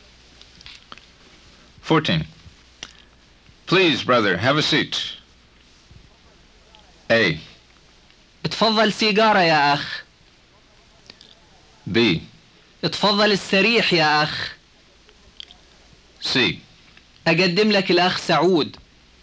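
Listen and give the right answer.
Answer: B: اتفضل السريح يا أخ.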